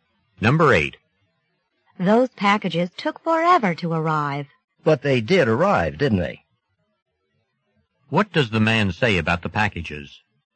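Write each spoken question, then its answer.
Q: What does the man say about the packages?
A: At least they arrived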